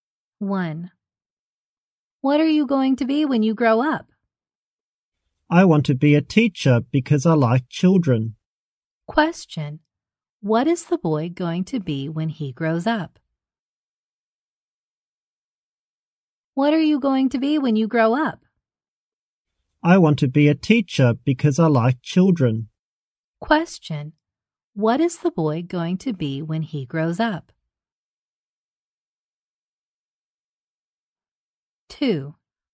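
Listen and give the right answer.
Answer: A teacher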